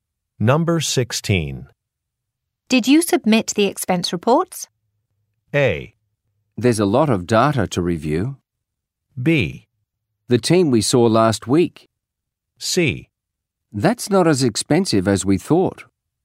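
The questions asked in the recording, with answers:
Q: Did you submit the expense reports?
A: A: There's a lot of data to review.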